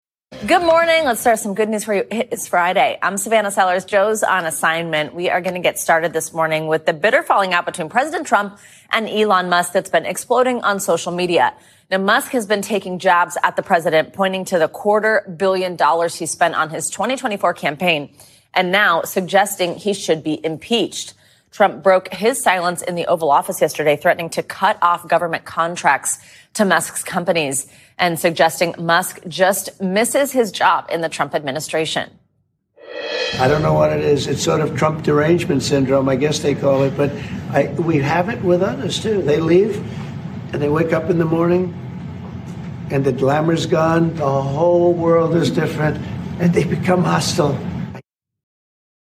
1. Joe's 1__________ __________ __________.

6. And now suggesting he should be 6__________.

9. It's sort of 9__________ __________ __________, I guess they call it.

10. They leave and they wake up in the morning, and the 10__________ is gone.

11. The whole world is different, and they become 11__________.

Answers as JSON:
{"1": "on an assignment", "6": "impeached", "9": "Trump Derangement Syndrome", "10": "glamour", "11": "hostile"}